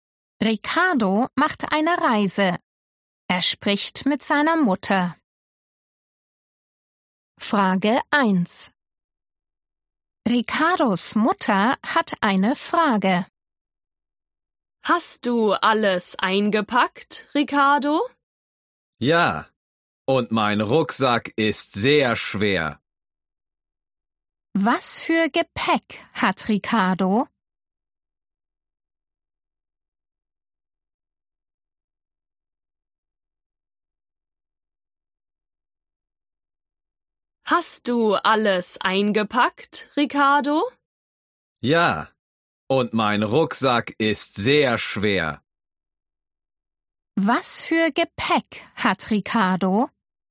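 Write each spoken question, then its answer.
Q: Was für Gepäck hat Ricardo?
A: einen Rucksack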